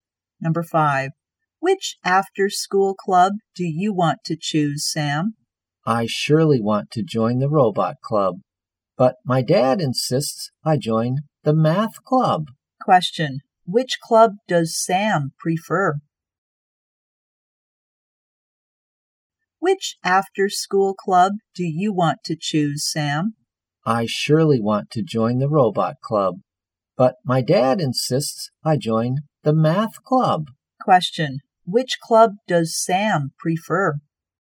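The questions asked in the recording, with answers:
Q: which club does Sam prefer?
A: The robot club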